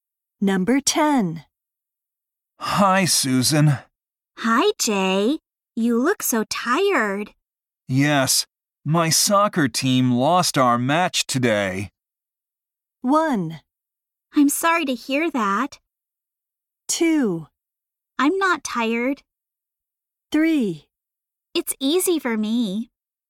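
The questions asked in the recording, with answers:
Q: Yes, my soccer team lost our match today.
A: 1: I'm sorry to hear that.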